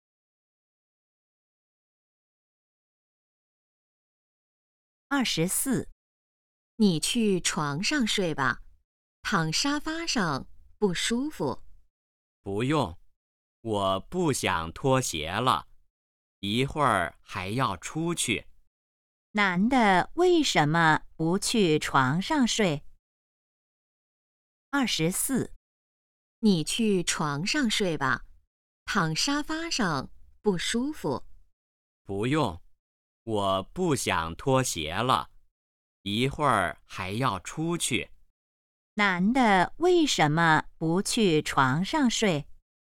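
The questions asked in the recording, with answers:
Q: 男的为什么不去床上睡?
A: 不想脱鞋,一会儿还要出去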